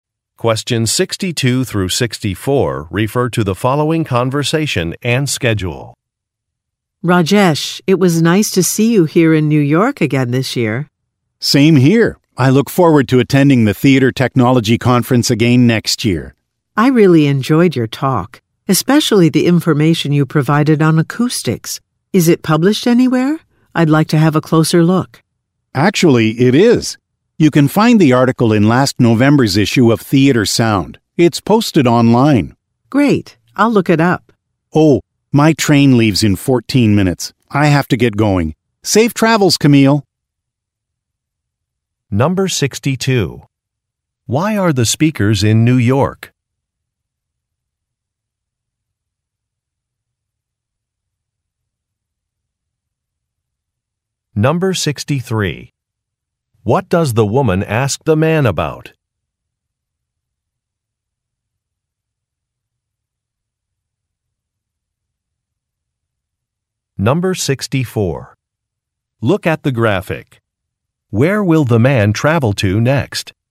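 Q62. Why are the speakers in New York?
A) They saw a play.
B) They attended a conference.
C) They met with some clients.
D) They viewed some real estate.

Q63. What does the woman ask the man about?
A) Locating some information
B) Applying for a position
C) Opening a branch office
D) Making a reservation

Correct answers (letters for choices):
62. B
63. A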